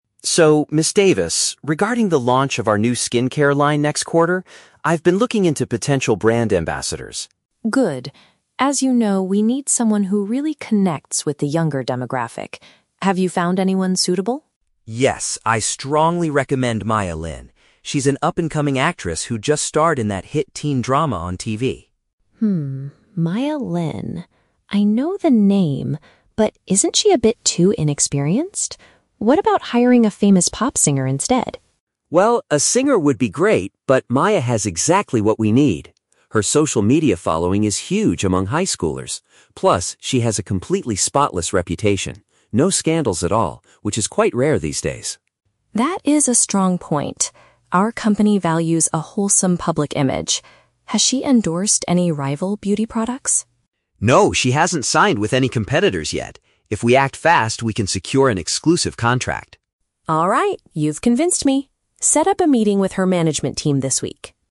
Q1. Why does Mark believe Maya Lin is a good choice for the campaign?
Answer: She has a very positive public image without any controversies.

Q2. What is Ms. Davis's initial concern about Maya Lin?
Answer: She might lack the necessary professional background.

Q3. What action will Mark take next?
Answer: He will arrange a discussion with the actress's representatives.

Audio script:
Mark: So, Ms. Davis, regarding the launch of our new skincare line next quarter, I've been looking into potential brand ambassadors.
Ms. Davis: Good. As you know, we need someone who really connects with the younger demographic. Have you found anyone suitable?
Mark: Yes, I strongly recommend Maya Lin. She's an up-and-coming actress who just starred in that hit teen drama on TV.
Ms. Davis: Hmm, Maya Lin... I know the name. But isn't she a bit too inexperienced? What about hiring a famous pop singer instead?
Mark: Well, a singer would be great, but Maya has exactly what we need. Her social media following is huge among high schoolers. Plus, she has a completely spotless reputation. No scandals at all, which is quite rare these days.
Ms. Davis: That is a strong point. Our company values a wholesome public image. Has she endorsed any rival beauty products?
Mark: No, she hasn't signed with any competitors yet. If we act fast, we can secure an exclusive contract.
Ms. Davis: Alright, you've convinced me. Set up a meeting with her management team this week.